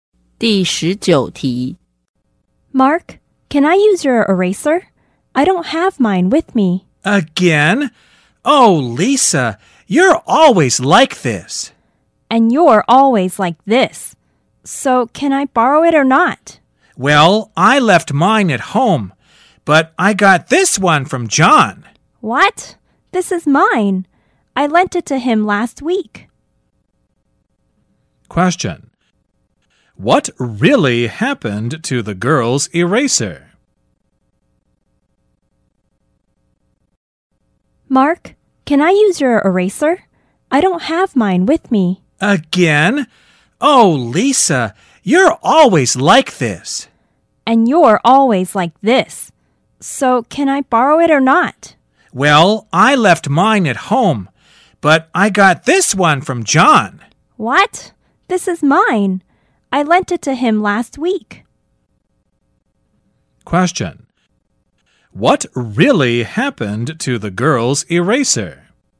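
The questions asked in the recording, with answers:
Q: What really happened to the girl's eraser?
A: She lent it to John, who lent it to Mark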